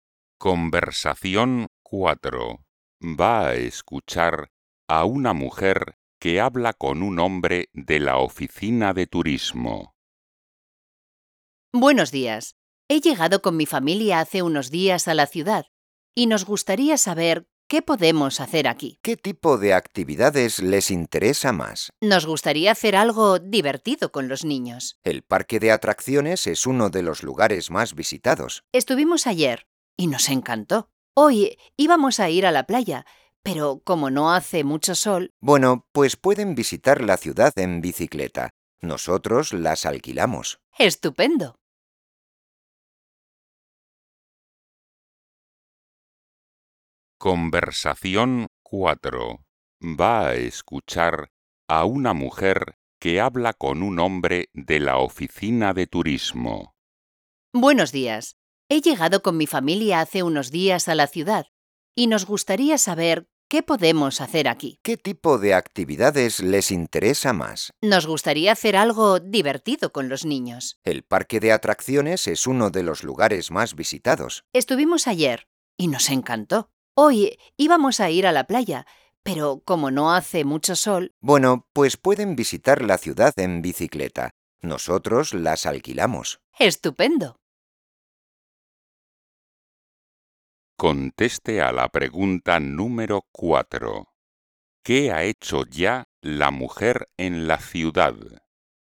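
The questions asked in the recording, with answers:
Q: ¿Qué ha hecho ya la mujer en la ciudad?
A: ir al parque de atracciones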